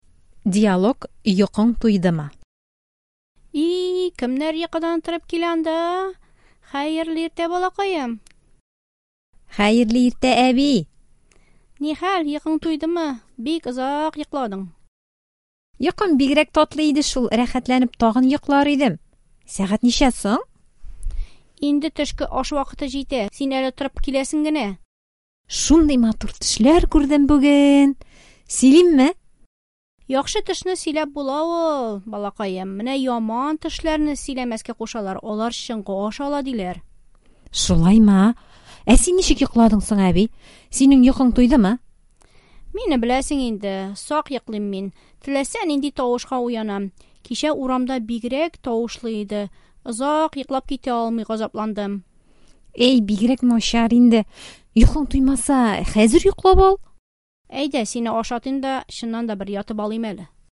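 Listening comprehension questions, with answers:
Бирем. Ответьте на вопросы по диалогу:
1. Сөйләшү башында кем йокыдан торып килә?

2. Онык ничек йоклады, аның йокысы нинди булды?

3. Онык нинди төшләр күрде?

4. Яхшы төшләрне сөйләргә ярыймы?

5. Яман төшне сөйләсәң, ни була?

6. Әби ничек йоклады? Нигә?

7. Әби сөйләшүдән соң нишләргә җыена?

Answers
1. Онык
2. Озак йоклады, йокысы бик татлы булды
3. Матур төшләр
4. Әйе, яхшы төшне сөйләп була
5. Ул чынга ашарга мөмкин
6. Начар йоклады, чөнки кичә урамда тавышлы иде һәм ул сак йоклый
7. Оныгын ашатып, бер ятып алырга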